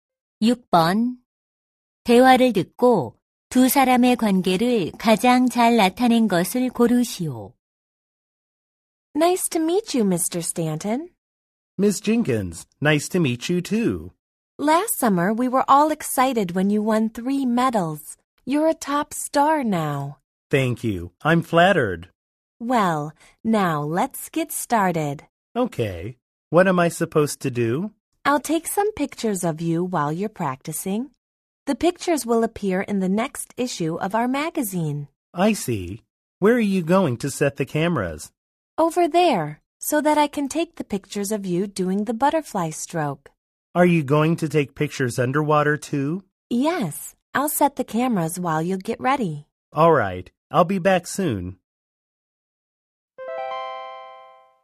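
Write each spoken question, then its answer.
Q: 대화를 듣고 두 사람의 관계를 가장 잘 나타낸 것을 고르시오.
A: 잡지사 사진작가 – 수영 선수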